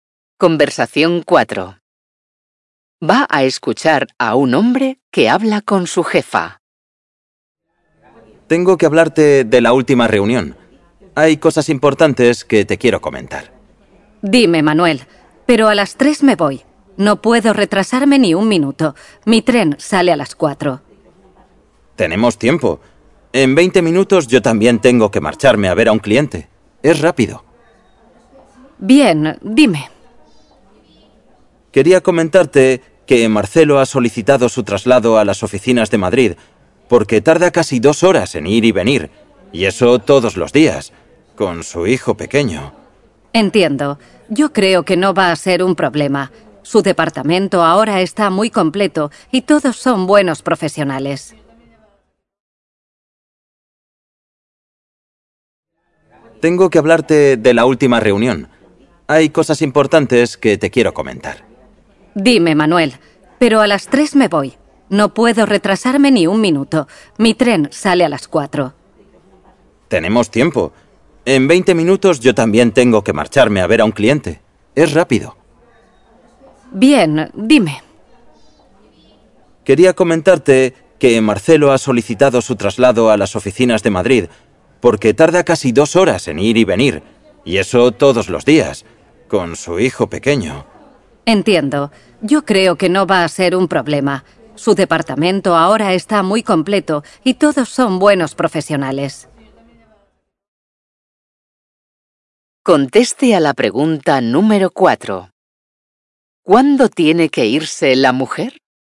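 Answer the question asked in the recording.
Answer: A las 3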